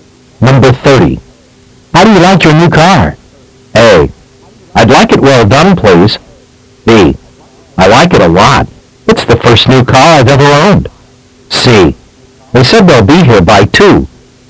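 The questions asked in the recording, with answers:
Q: How do you like your new car?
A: B: I like it a lot. It's the first new car I've ever owned.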